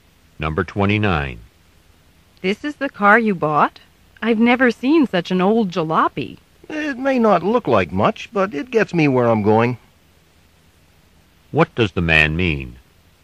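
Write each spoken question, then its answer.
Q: What does the man mean?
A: The car is old but reliable.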